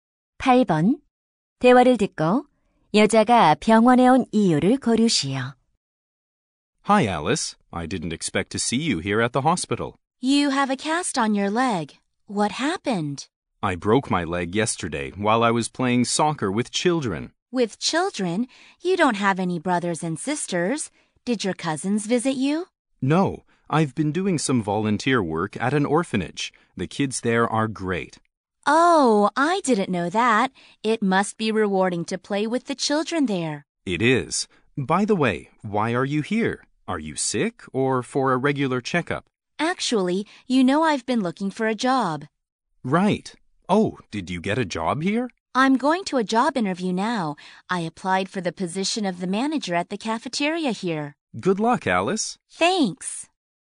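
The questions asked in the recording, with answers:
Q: 대화를 듣고 여자가 병원에 온 이유를 고르시오.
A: 구내식당 매니저 자리 면접을 보려고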